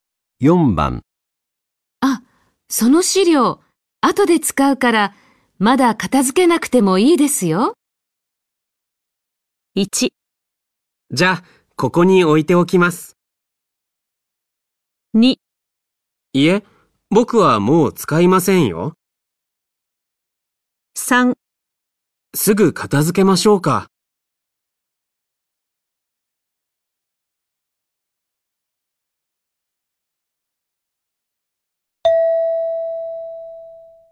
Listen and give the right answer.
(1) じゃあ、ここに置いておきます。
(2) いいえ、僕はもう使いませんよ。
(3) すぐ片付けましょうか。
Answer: (1) じゃあ、ここに置いておきます。

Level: N4 Listening · Test 1